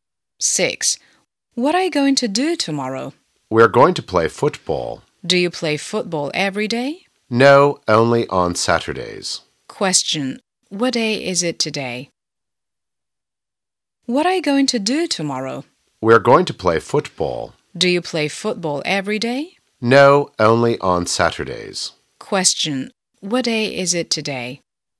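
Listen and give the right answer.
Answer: Friday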